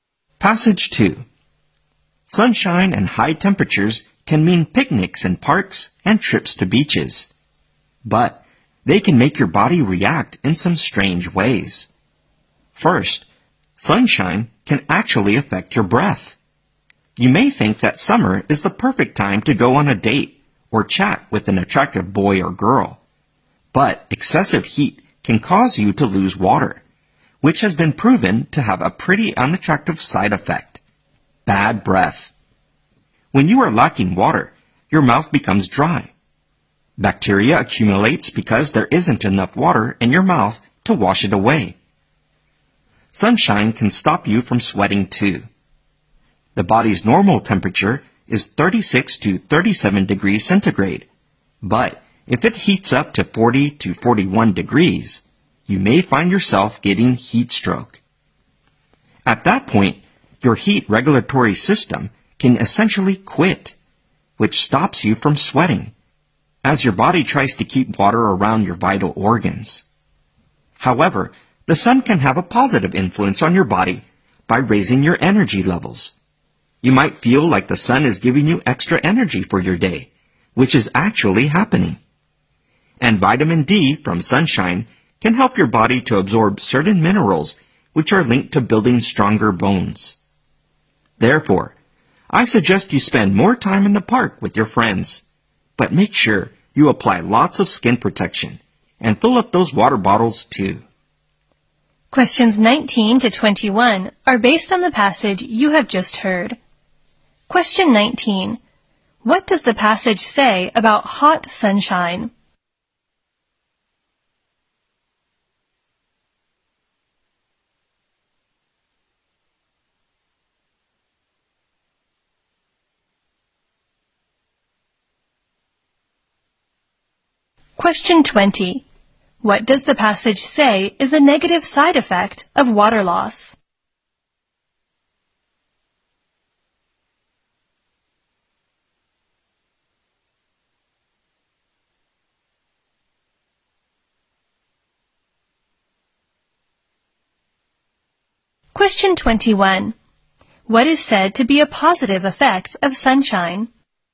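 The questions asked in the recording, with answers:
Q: What does the passage say is a negative side effect of water loss?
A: Bad breath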